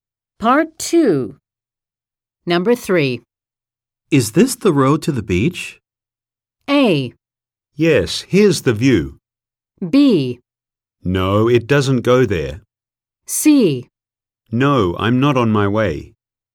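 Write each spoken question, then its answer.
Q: Is this the road to the beach?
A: B: No, it doesn't go there.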